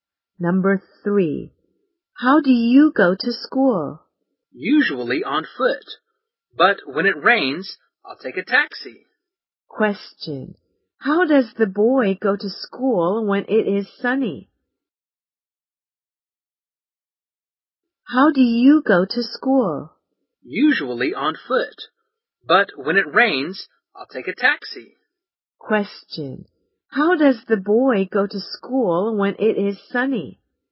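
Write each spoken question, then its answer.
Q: How does the boy go to school when it is sunny?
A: On foot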